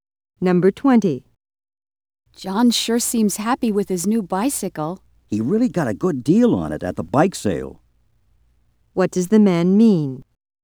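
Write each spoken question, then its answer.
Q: What does the man mean?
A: John bought the bicycle at a good price.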